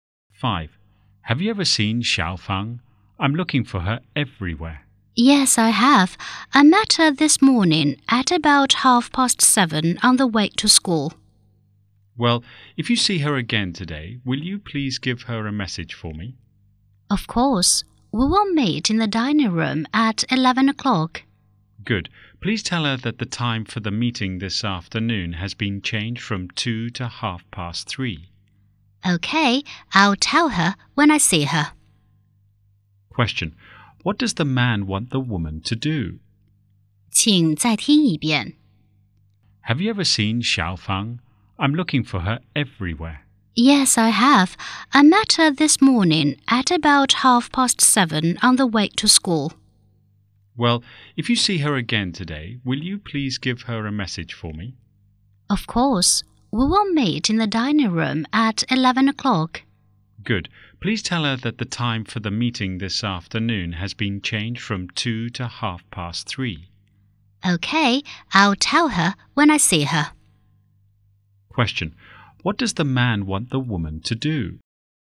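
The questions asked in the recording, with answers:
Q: Question. What does the man want the woman to do?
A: Tell Xiao Fang the meeting time has changed from 2:00 to 3:30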